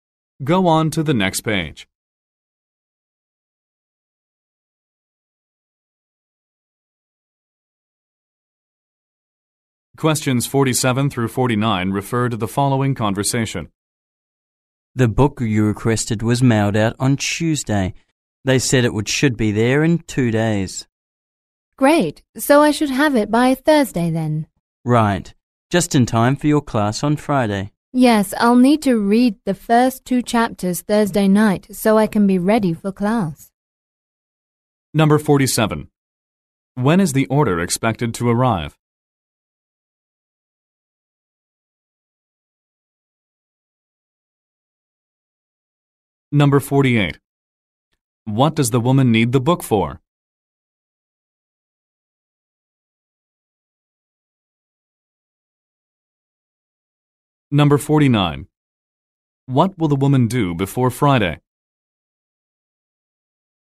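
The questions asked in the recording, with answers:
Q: When is the order expected to arrive?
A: Thursday

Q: What does the woman need the book for?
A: Her class

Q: What will the woman do before Friday?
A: Read the first 2 chapters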